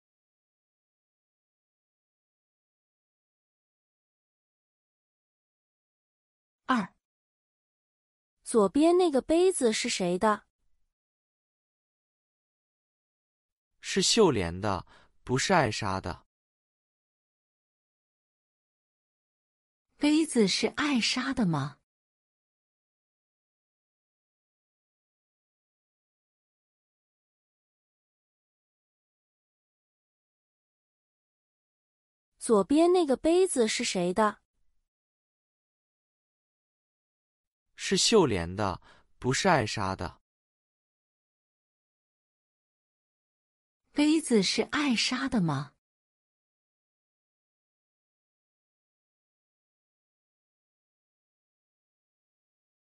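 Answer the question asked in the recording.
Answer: 不是,是秀莲的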